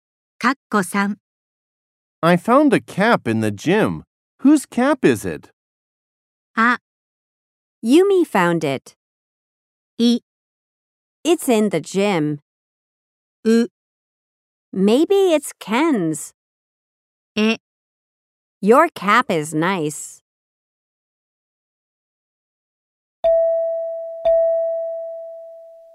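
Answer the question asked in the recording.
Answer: う: Maybe it's Ken's.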